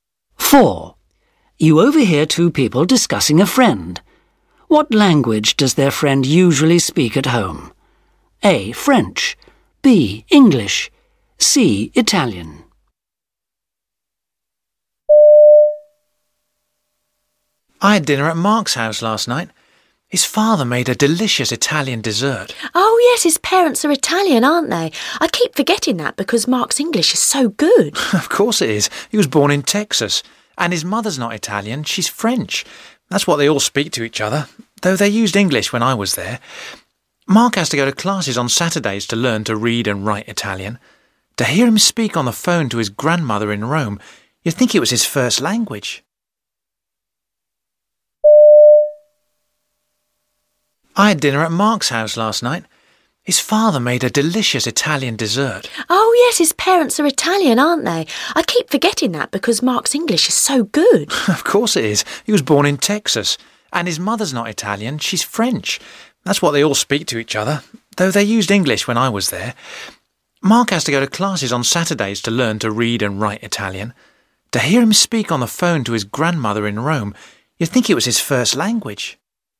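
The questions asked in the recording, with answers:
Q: What language does their friend usually speak at home?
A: A: French.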